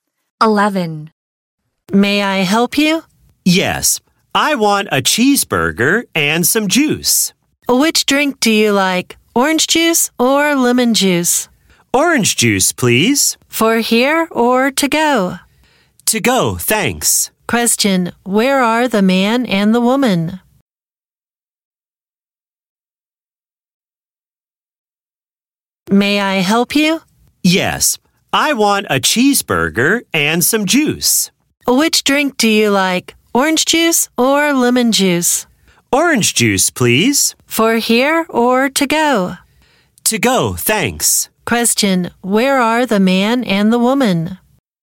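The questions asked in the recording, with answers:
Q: Question, where are the man and the woman?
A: At a fast food restaurant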